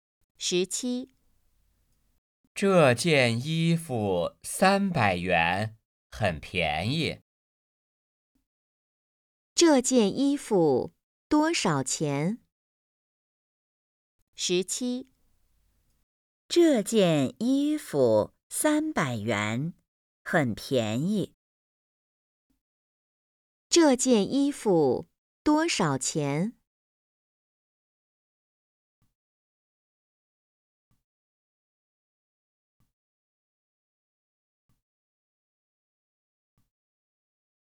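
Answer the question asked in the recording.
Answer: 300元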